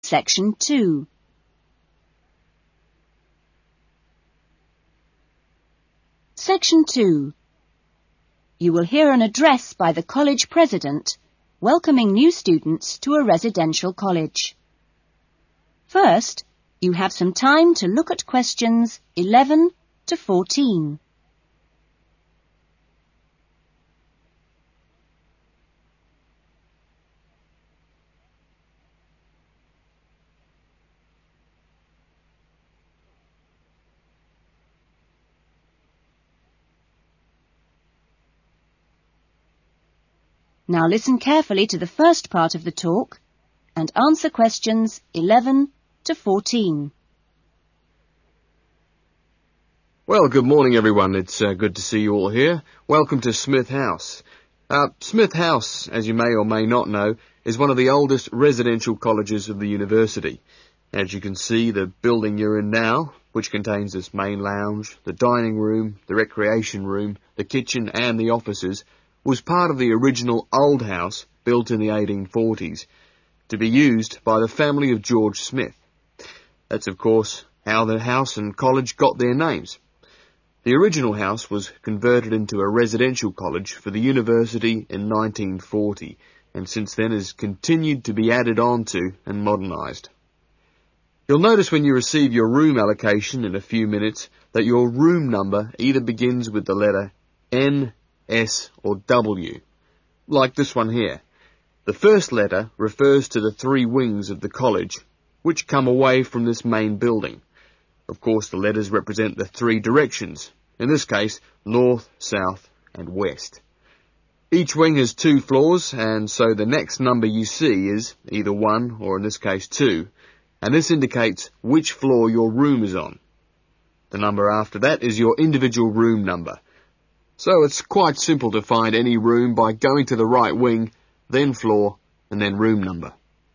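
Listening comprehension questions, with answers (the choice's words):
Circle the correct letter A-D.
Smith House was originally built as...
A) a residential college.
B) a family house.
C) a university.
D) an office block.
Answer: a family house.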